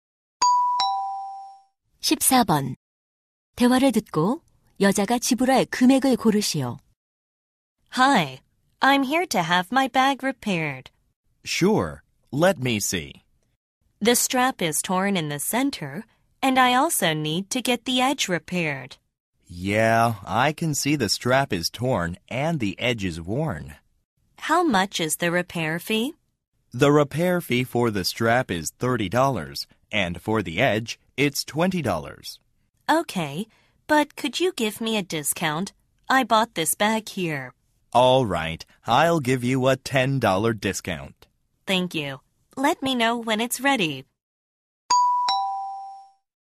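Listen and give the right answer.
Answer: $40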